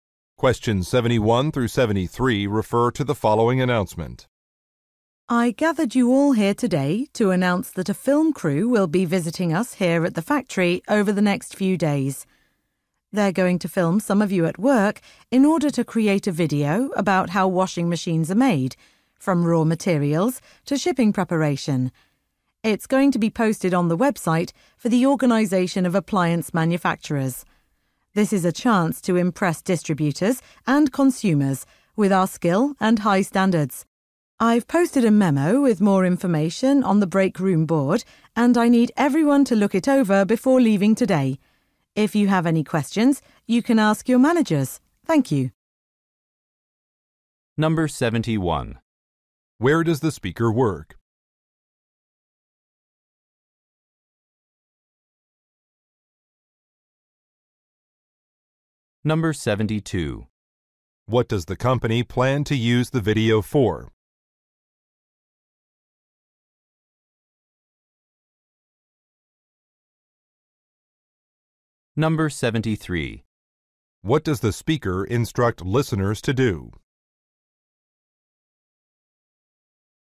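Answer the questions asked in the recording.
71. At a factory that makes washing machines
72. To post on an industry organization's website to impress distributors and consumers
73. Read a memo on the break room board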